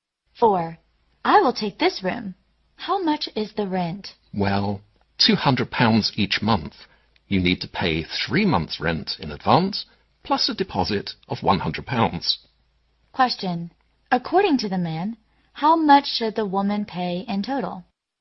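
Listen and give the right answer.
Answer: £700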